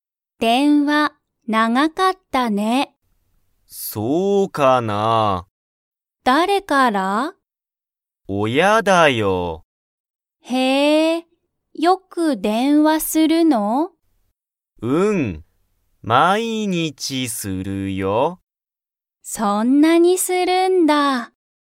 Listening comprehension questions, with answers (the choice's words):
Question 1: ユウトは____から電話(でんわ)があった。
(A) 親(おや)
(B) 友達(ともだち)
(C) 先生(せんせい)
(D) リサ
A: 親(おや)

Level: Level 1